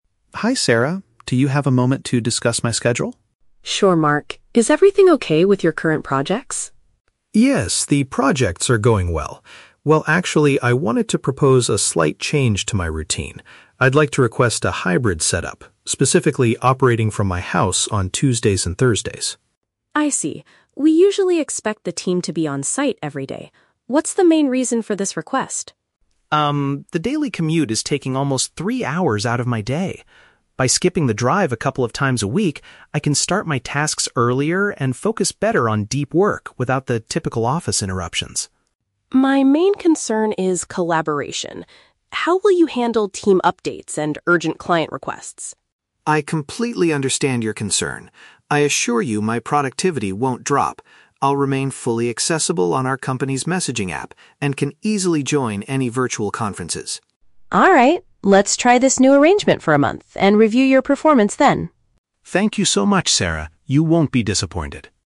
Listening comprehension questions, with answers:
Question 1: What is Mark primarily asking his manager for?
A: To do his job remotely twice a week.

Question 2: Why does Mark believe this change will be beneficial?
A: It will save the time he currently spends traveling to the workplace.

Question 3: How does Mark promise to stay connected with his colleagues?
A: By being online on the communication software and attending video calls.

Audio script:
Mark: Hi Sarah, do you have a moment to discuss my schedule?
Sarah: Sure, Mark. Is everything okay with your current projects?
Mark: Yes, the projects are going well. Well, actually, I wanted to propose a slight change to my routine. I'd like to request a hybrid setup—specifically, operating from my house on Tuesdays and Thursdays.
Sarah: I see. We usually expect the team to be on-site every day. What's the main reason for this request?
Mark: Um, the daily commute is taking almost three hours out of my day. By skipping the drive a couple of times a week, I can start my tasks earlier and focus better on deep work without the typical office interruptions.
Sarah: My main concern is collaboration. How will you handle team updates and urgent client requests?
Mark: I completely understand your concern. I assure you my productivity won't drop. I'll remain fully accessible on our company's messaging app and can easily join any virtual conferences.
Let's try this new arrangement for a month and review your performance then.